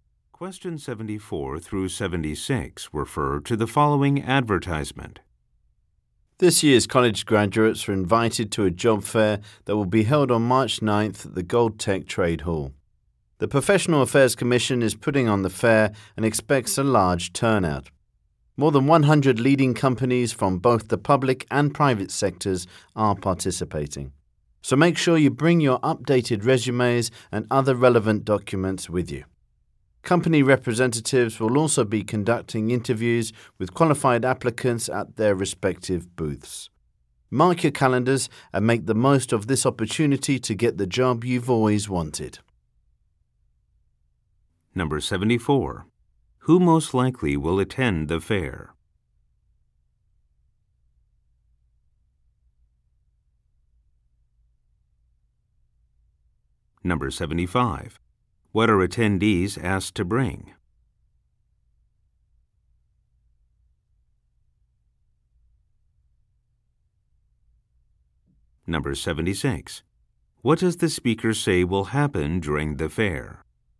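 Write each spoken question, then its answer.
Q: Who most likely will attend the fair?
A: This year's college graduates

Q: What are attendees asked to bring?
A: Updated resumes and other relevant documents

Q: What does the speaker say will happen during the fair?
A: Company representatives will conduct interviews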